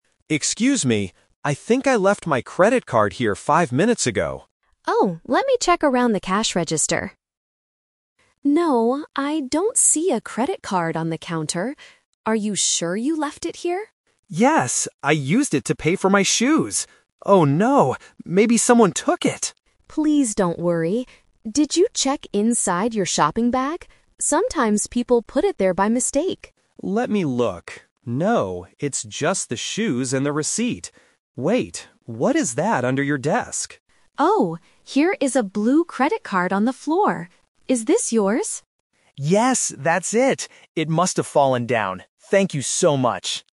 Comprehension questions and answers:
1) What is the customer looking for?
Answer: A credit card.

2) What does the customer find inside his shopping bag?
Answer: Only his shoes and receipt.

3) Where is the credit card finally found?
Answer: On the floor.

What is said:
Customer: Excuse me! I think I left my credit card here five minutes ago.
Cashier: Oh, let me check around the cash register. No, I don't see a credit card on the counter. Are you sure you left it here?
Customer: Yes, I used it to pay for my shoes. Oh no, maybe someone took it!
Cashier: Please don't worry. Did you check inside your shopping bag? Sometimes people put it there by mistake.
Customer: Let me look. No, it's just the shoes and the receipt. Wait... what is that under your desk?
Cashier: Oh! Here is a blue credit card on the floor. Is this yours?